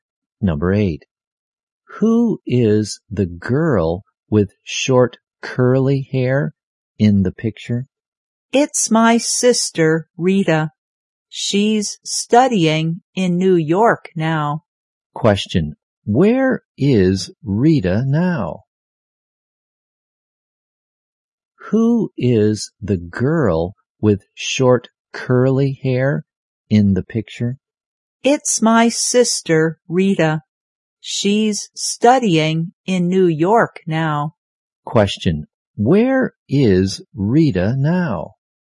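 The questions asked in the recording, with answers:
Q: Where is Rita now?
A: In New York.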